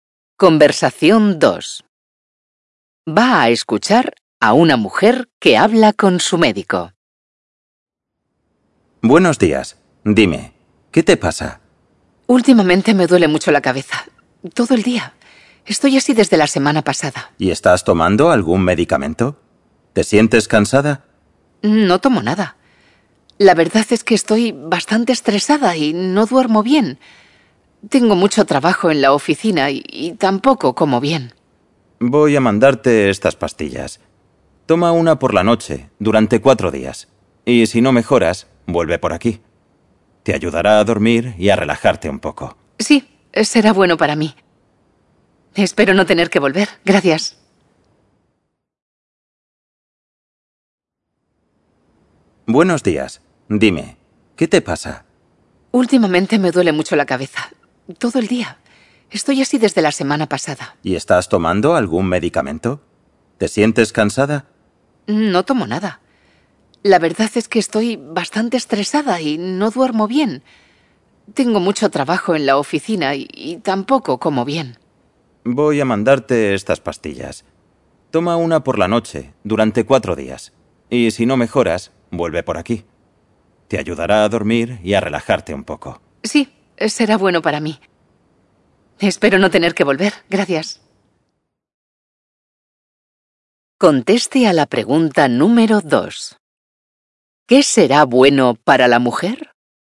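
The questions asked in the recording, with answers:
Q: ¿Qué será bueno para la mujer?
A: Las pastillas que le manda el médico, para dormir y relajarse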